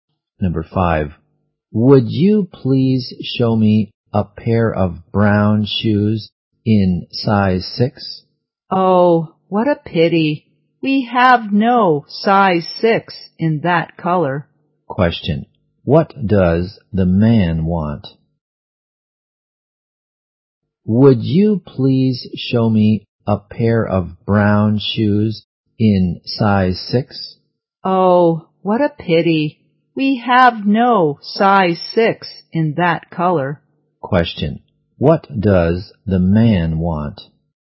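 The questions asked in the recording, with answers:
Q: Question, what does the man want?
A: Brown shoes in size 6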